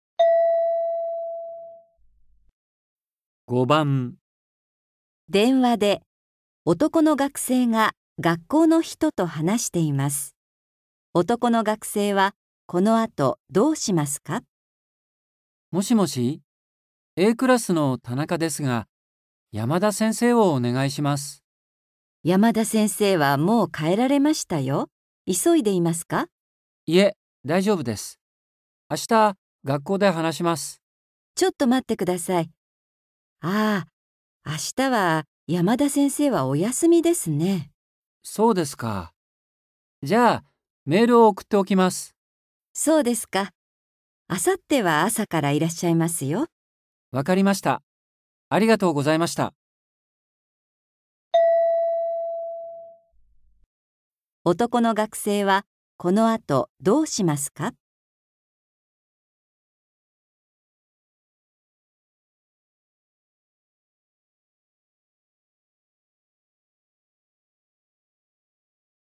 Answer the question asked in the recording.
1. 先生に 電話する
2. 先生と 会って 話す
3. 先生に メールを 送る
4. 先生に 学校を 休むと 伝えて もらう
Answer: 3. 先生に メールを 送る

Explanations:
M:そうですか。じゃあ、メールを送っておきます。

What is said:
M:もしもし、Aクラスの田中ですが、山田先生をお願いします。
F:山田先生はもう帰られましたよ。急いでいますか。
M:いえ、大丈夫です。明日、学校で話します。
M:そうですか。じゃあ、メールを送っておきます。
F:そうですか。明後日は朝からいらっしゃいますよ。
M:わかりました。ありがとうございました。
男の学生は、この後、どうしますか。

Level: N4